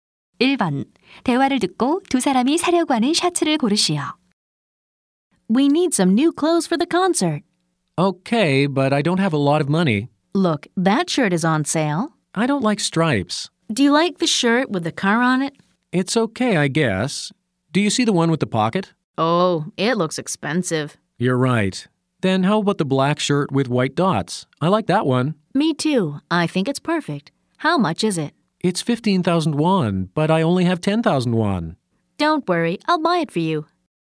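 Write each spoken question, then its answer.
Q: 대화를 듣고 두 사람이 사려고 하는 셔츠를 고르시오.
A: 흰 점무늬가 있는 검은 셔츠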